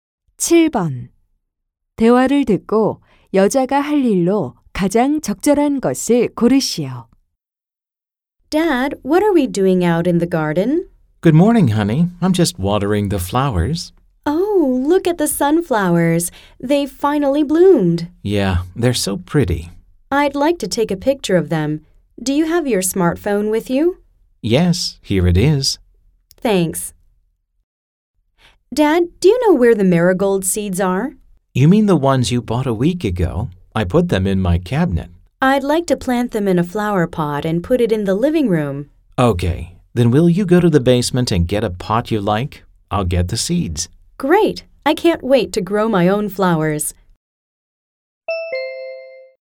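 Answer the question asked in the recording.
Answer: Go to the basement and get a flower pot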